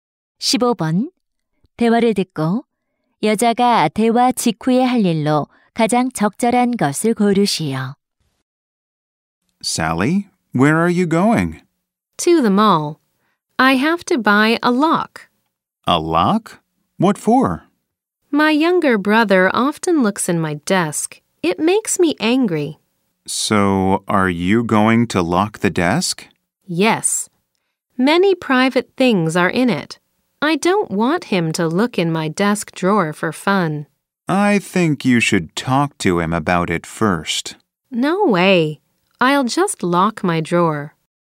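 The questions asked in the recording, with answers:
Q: 대화를 듣고 여자가 대화 직후에 할 일로 가장 적절한 것을 고르시오.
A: 쇼핑몰에 가서 자물쇠를 산다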